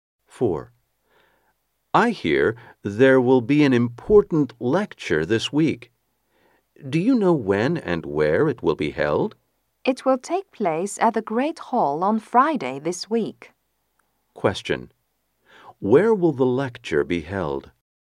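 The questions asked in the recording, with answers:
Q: Where will the lecture be held?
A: At the Great Hall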